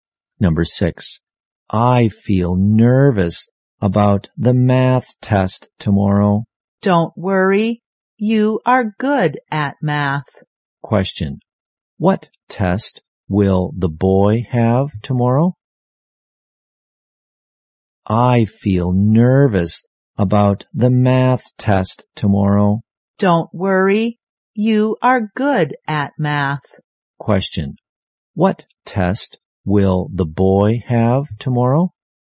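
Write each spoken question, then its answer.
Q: Question, what test?Will the boy have tomorrow?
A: A math test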